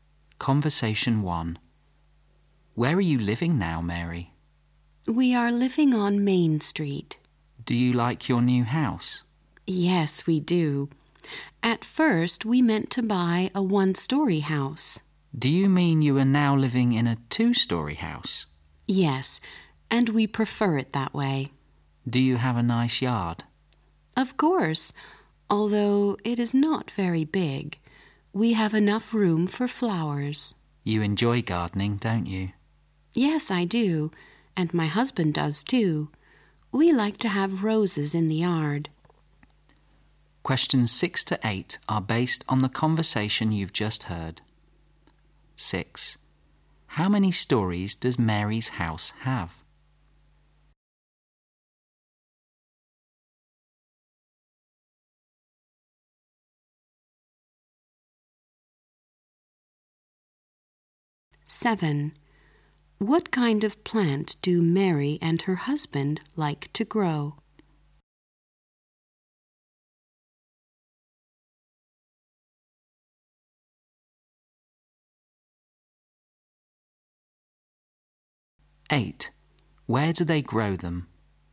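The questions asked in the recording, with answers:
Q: How many stories does Mary's house have?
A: Two

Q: What kind of plant do Mary and her husband like to grow?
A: Roses

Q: Where do they grow them?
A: In the yard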